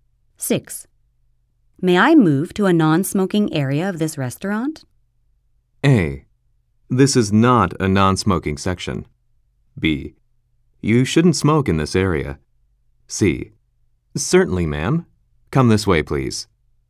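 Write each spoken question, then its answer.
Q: May I move to a non-smoking area of this restaurant?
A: C: Certainly, ma'am. Come this way, please.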